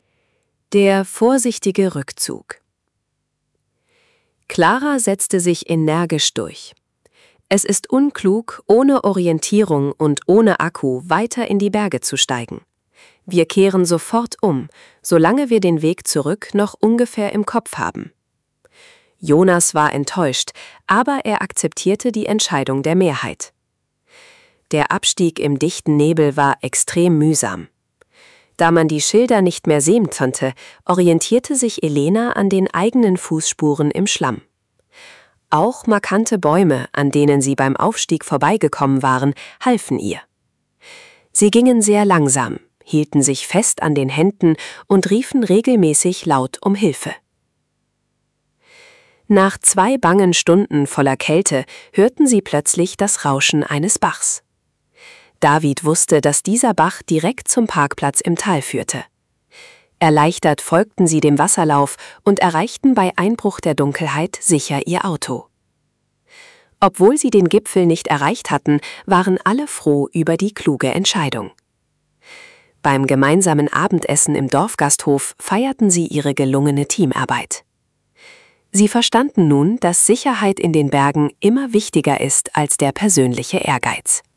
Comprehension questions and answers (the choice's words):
Wählen Sie bei den folgenden Aufgaben die einzig richtige Option aus. (Die richtigen Antworten sind gleichmäßig über A, B, C und D verteilt!)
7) Welches Argument nutzt Clara in Option 2 für den Rückzug?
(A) Es ist unklug, ohne Orientierung und ohne Akku weiterzugehen.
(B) Sie findet die hölzerne Hütte viel zu ungemütlich.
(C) Sie möchte lieber im Dorfgasthof eine warme Suppe essen.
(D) Sie hat Angst vor wilden Tieren im dichten Wald.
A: Es ist unklug, ohne Orientierung und ohne Akku weiterzugehen.

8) Wie orientiert sich die Gruppe beim Abstieg in Option 2?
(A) Sie nutzen einen alten Kompass aus Davids Tasche.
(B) Sie warten, bis der Mond ihnen den Weg zeigt.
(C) Sie folgen den eigenen Fußspuren im Schlamm und bekannten Bäumen.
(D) Sie folgen den Schildern, die wieder gut sichtbar werden.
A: Sie folgen den eigenen Fußspuren im Schlamm und bekannten Bäumen.

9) Welches Geräusch signalisiert den Wanderern in Option 2 den Weg zum Parkplatz?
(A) Die Glocke einer Kirche im nahegelegenen Dorf.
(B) Das laute Rauschen eines Bachs, der ins Tal führt.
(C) Das Hupen ihres Autos in der Ferne.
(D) Sie hören Stimmen von anderen Sportlern im Wald.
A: Das laute Rauschen eines Bachs, der ins Tal führt.

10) Welche wesentliche Lektion lernt die Gruppe am Ende dieser Geschichte?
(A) Dass man in den Bergen immer ein zweites Smartphone braucht.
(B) Dass sportlicher Ehrgeiz wichtiger ist als die Sicherheit.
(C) Dass Wanderungen im Herbst grundsätzlich verboten sein sollten.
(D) Dass Sicherheit in den Bergen immer Vorrang vor dem persönlichen Ehrgeiz hat.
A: Dass Sicherheit in den Bergen immer Vorrang vor dem persönlichen Ehrgeiz hat.

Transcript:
Option 2: Der vorsichtige Rückzug
Der vorsichtige Rückzug
Clara setzte sich energisch durch. „Es ist unklug, ohne Orientierung und ohne Akku weiter in die Berge zu steigen. Wir kehren sofort um, solange wir den Weg zurück noch ungefähr im Kopf haben." Jonas war enttäuscht, aber er akzeptierte die Entscheidung der Mehrheit. Der Abstieg im dichten Nebel war extrem mühsam. Da man die Schilder nicht mehr sehen konnte, orientierte sich Elena an den eigenen Fußspuren im Schlamm. Auch markante Bäume, an denen sie beim Aufstieg vorbeigekommen waren, halfen ihr. Sie gingen sehr langsam, hielten sich fest an den Händen und riefen regelmäßig laut um Hilfe.
Nach zwei bangen Stunden voller Kälte hörten sie plötzlich das Rauschen eines Bachs. David wusste, dass dieser Bach direkt zum Parkplatz im Tal führte. Erleichtert folgten sie dem Wasserlauf und erreichten bei Einbruch der Dunkelheit sicher ihr Auto. Obwohl sie den Gipfel nicht erreicht hatten, waren alle froh über die kluge Entscheidung. Beim gemeinsamen Abendessen im Dorfgasthof feierten sie ihre gelungene Teamarbeit. Sie verstanden nun, dass Sicherheit in den Bergen immer wichtiger ist als der persönliche Ehrgeiz.

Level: B1